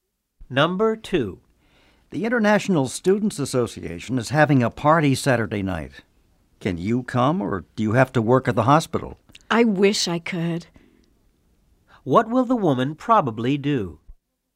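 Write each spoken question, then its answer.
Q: What will the woman probably do?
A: She will work at the hospital and not go to the party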